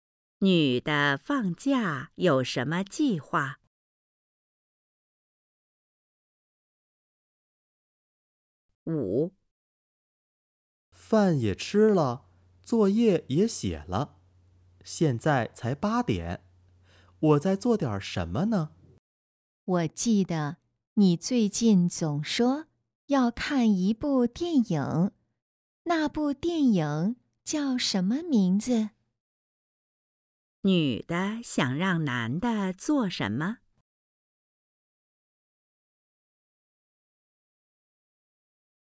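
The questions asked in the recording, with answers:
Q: 女的想让男的做什么?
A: 看电影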